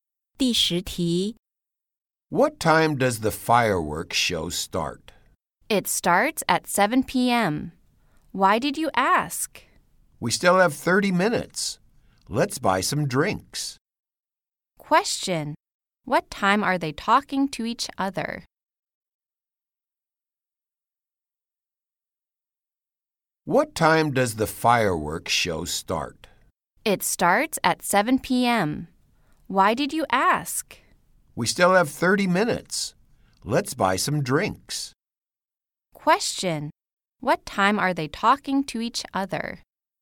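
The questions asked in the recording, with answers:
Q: What time are they talking to each other?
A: 6:30 p.m.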